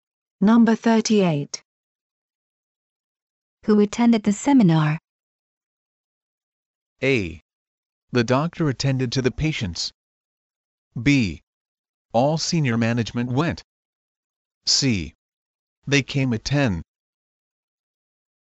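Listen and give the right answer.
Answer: B: All senior management went.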